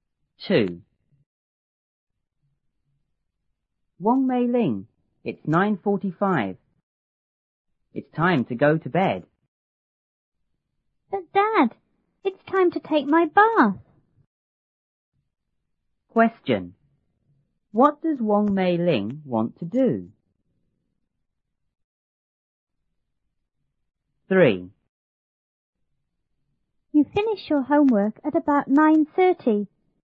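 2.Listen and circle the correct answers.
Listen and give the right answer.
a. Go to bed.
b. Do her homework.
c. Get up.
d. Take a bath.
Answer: d. Take a bath.

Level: 初中英语广州版1B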